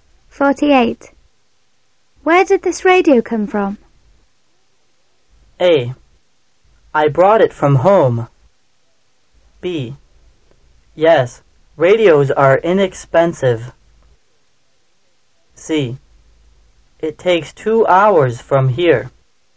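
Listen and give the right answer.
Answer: A: I brought it from home.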